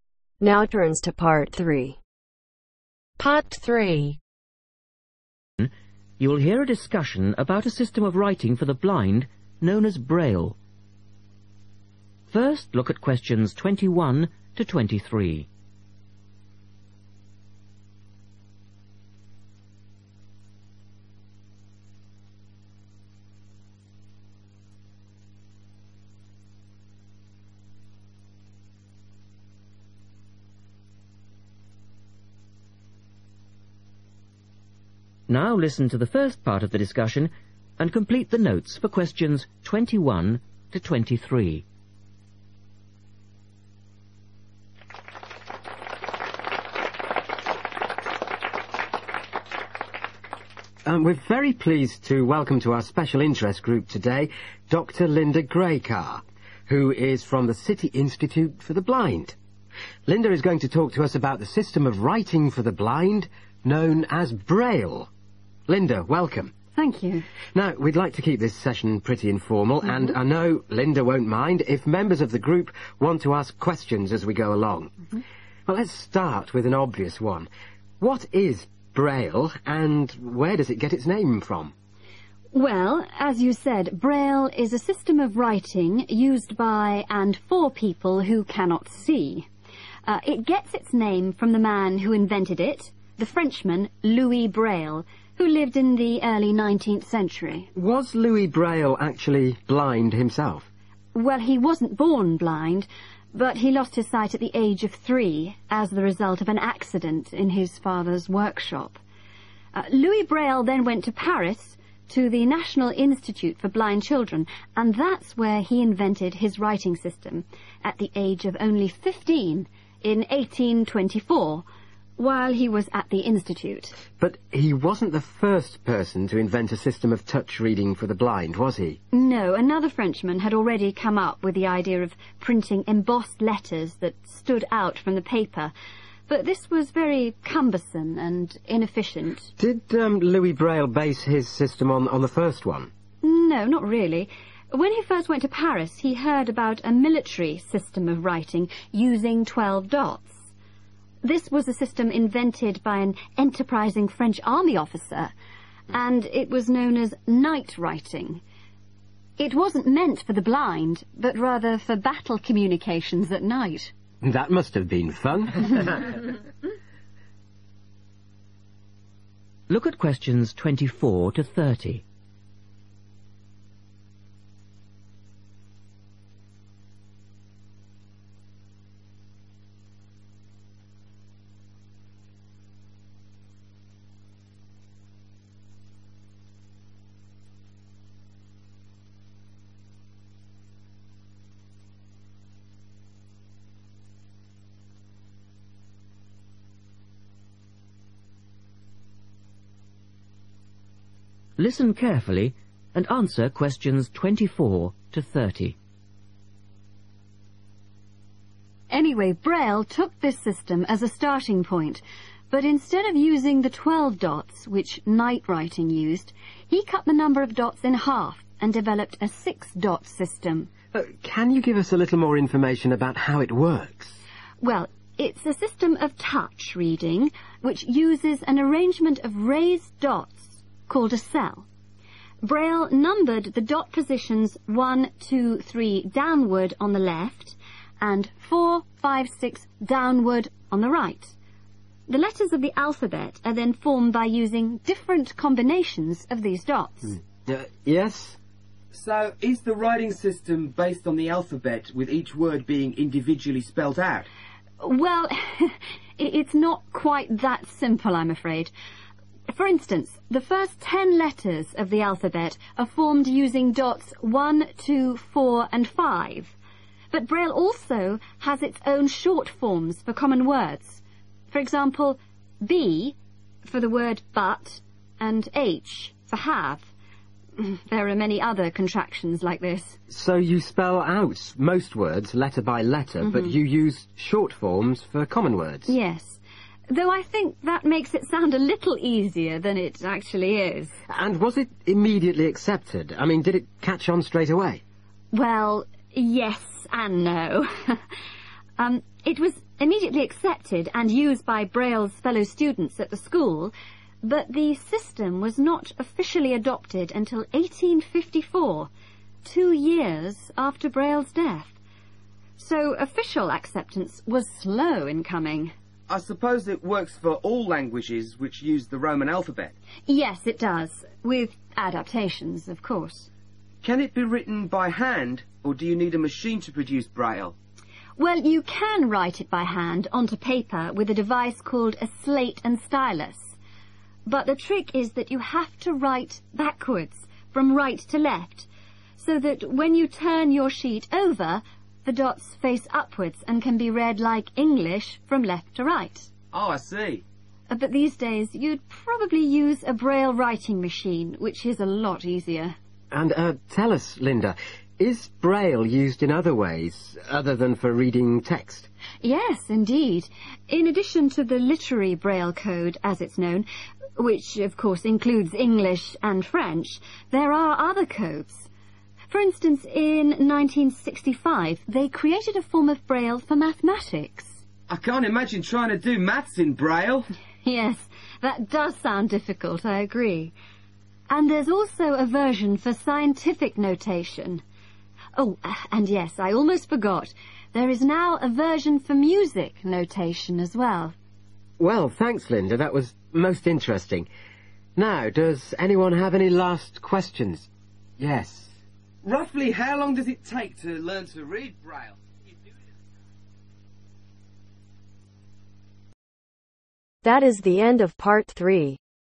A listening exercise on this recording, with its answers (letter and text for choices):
Complete the notes below. Write NO MORE THAN TWO WORDS OR A NUMBER for each answer.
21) Louis Braille was blinded as a child in his (21) ..........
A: father's workshop

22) Braille invented the writing system in the year (22) ..........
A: 1824

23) A military system using dots was called (23) ...........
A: night writing

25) What can be combined dots represent ?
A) both letters and words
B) only individual words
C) only letters of the alphabet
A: A) both letters and words

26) When was the Braille system officially adopted ?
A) as soon as it was invented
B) two years after it was invented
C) after Louis Braille had died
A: C) after Louis Braille had died

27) What is unusual about the way Braille is written ?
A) It can only be written using a machine.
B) The texts have Braille is created in reverse.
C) Handwritten Braille is created in reverse.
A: C) Handwritten Braille is created in reverse.